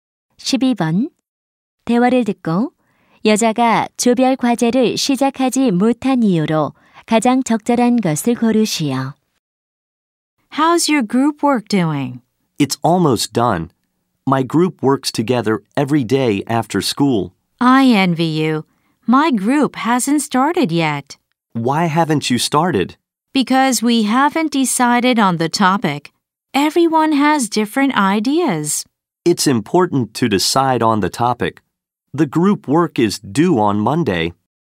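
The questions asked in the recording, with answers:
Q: 대화를 듣고 여자가 조별 과제를 시작하지 못한 이유로 가장 적절한 것을 고르시오.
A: 주제를 정하지 못해서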